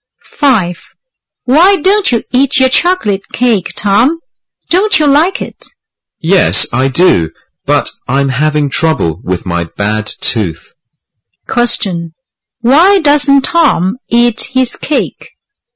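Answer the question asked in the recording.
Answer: He has a bad tooth.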